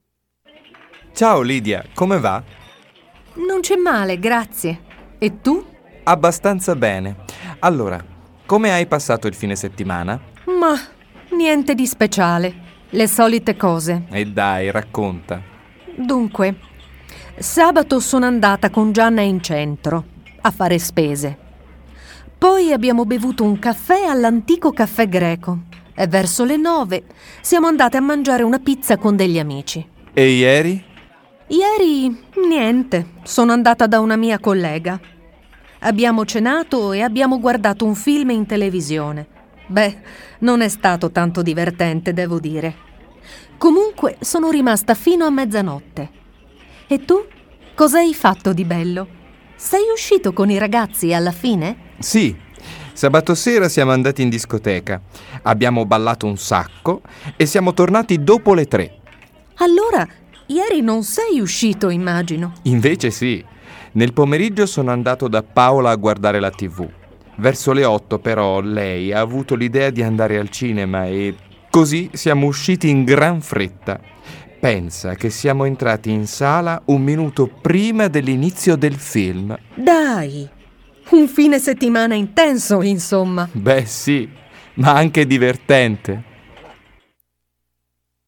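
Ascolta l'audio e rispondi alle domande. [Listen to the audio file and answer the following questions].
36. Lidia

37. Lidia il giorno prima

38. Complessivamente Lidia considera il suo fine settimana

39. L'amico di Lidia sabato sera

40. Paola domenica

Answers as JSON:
{"36": "sabato è andata in centro a fare spese con Gianna e poi a mangiare una pizza", "37": "è andata a cena da una collega e ha guardato un film in TV", "38": "niente di speciale", "39": "è andato in discoteca ed è tornato dopo le 3", "40": "ha avuto l'idea di andare al cinema"}

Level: CEFR levels : A1.1 - A1.5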